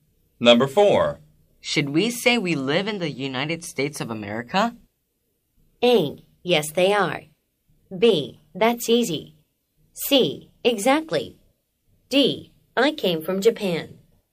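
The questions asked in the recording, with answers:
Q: Should we say we live in the United States of America?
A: C: Exactly.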